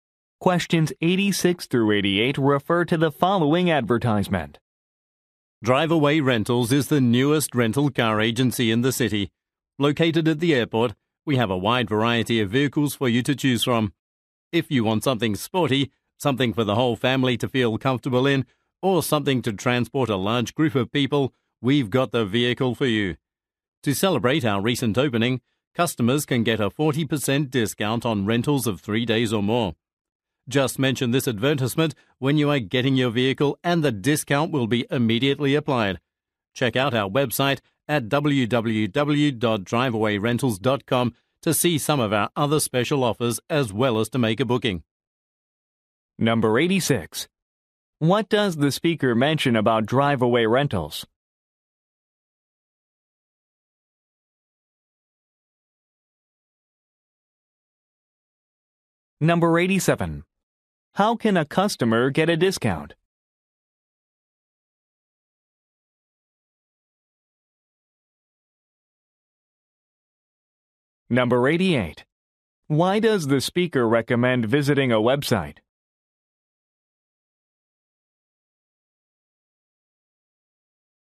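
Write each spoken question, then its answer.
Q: What does the speaker mention about Driveaway Rentals?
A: It is the newest rental agency, located at the airport

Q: How can a customer get a discount?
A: Mention the advertisement and rent for 3 days or more

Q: Why does the speaker recommend visiting a website?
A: To see other special offers and make a booking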